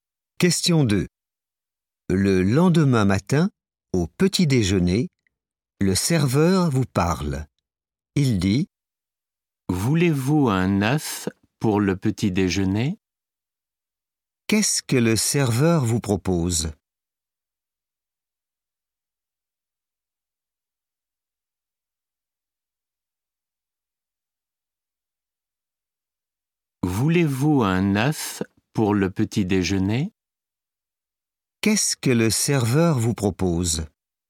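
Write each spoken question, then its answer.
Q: Qu'est-ce que le serveur vous propose ?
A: un œuf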